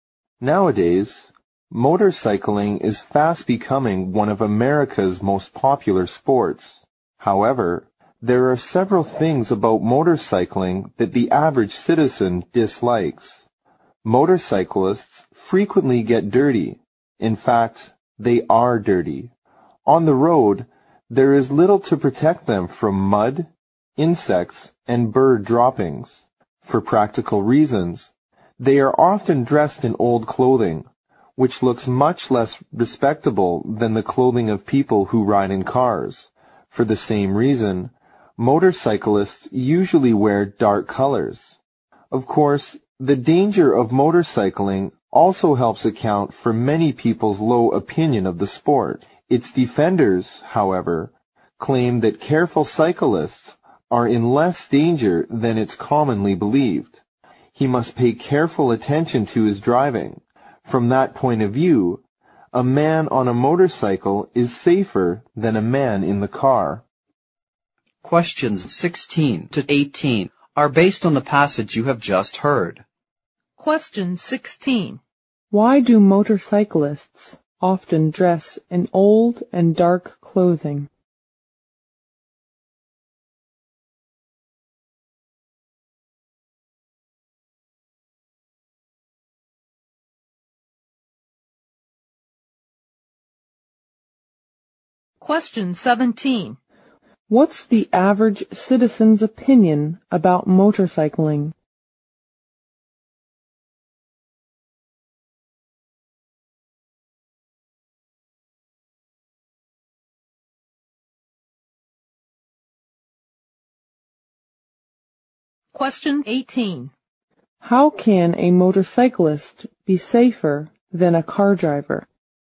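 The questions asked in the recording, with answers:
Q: Why do motorcyclists often dress in old and dark clothing?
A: For practical reasons: they get dirty on the road

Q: What's the average citizen's opinion about motorcycling?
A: A low opinion: it is dirty and dangerous

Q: How can a motorcyclist be safer than a car driver?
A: He must pay careful attention to his driving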